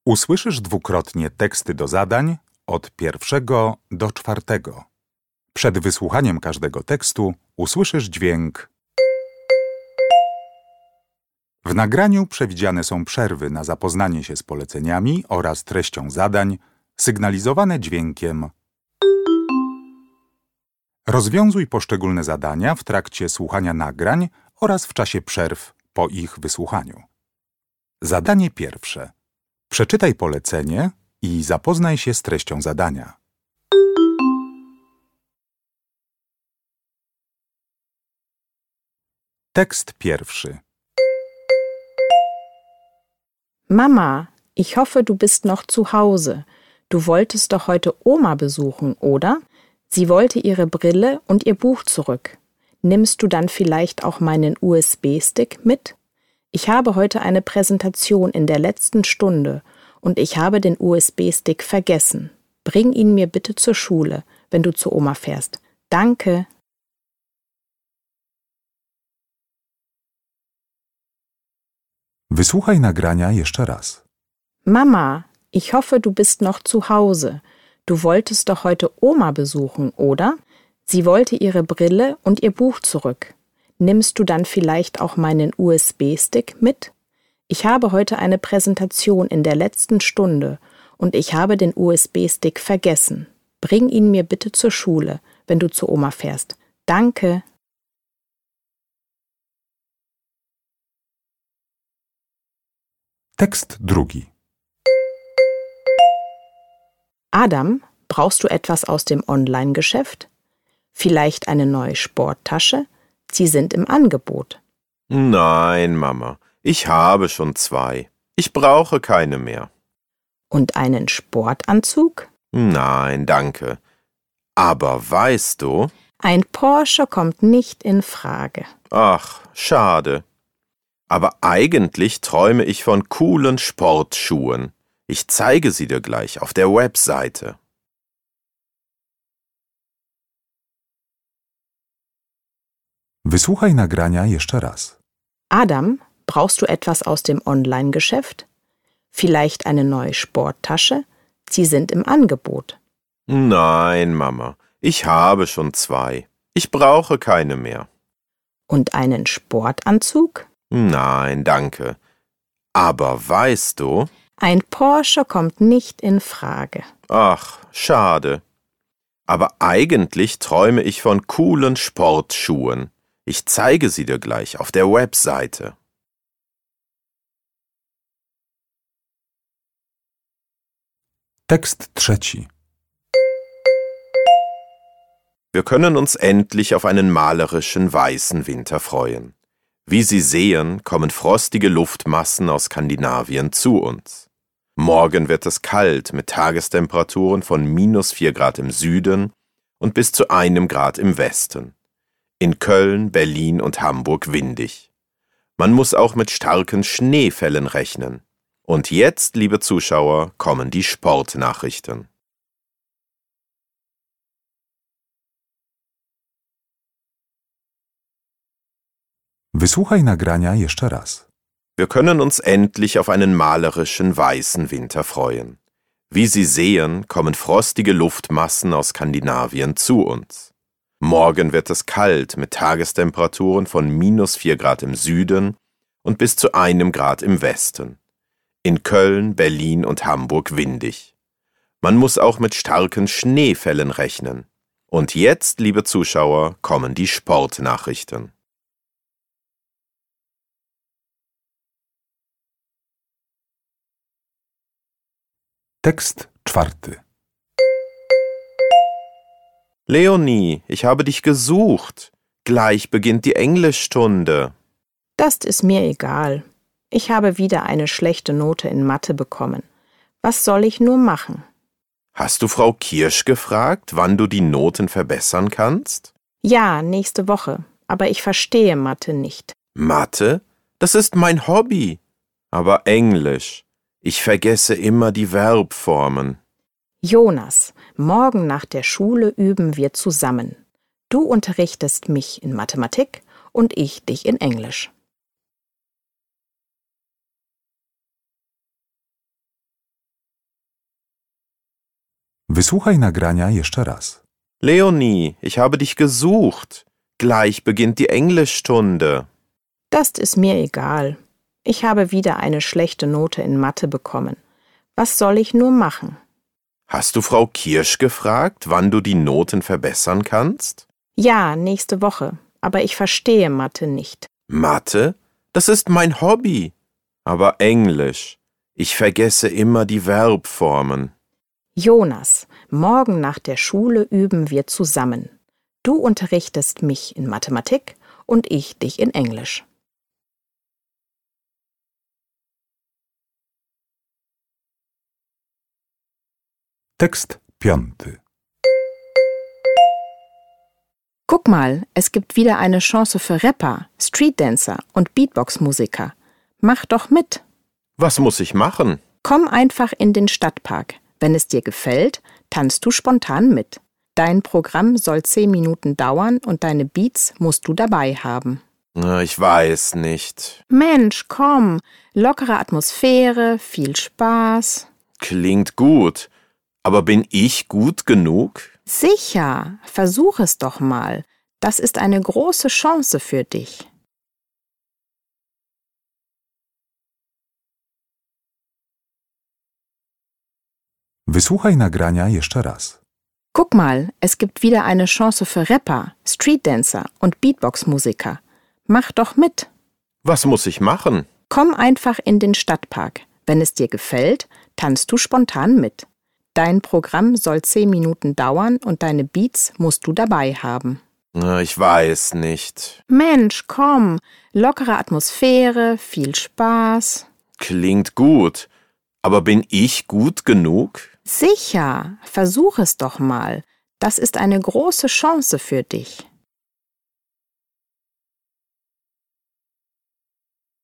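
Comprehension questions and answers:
Uruchamiając odtwarzacz z oryginalnym nagraniem CKE usłyszysz dwukrotnie pięć tekstów. W zadaniach 1.1.–1.5., na podstawie informacji zawartych w nagraniu, z podanych odpowiedzi wybierz właściwą.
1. Was hat das Mädchen zu Hause gelassen?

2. Was möchte Adam aus dem Online-Geschäft?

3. Wer sagt das?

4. Die Schulfreunde sprechen über ihre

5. Das Mädchen spricht mit dem Jungen, denn es möchte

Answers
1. den USB-Stick
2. Sportschuhe
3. ein Wettersprecher im Fernsehen
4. Probleme mit Schulfächern (Mathe und Englisch)
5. ihn zur Teilnahme an einem Wettbewerb im Stadtpark motivieren

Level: egzamin ósmoklasisty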